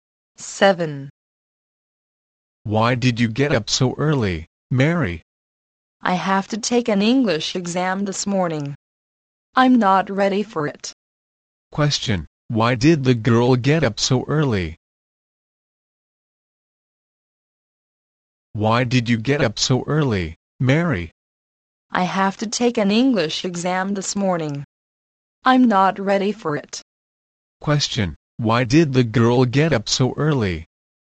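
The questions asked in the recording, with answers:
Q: Question, why did the girl get up so early?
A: She has to take an English exam this morning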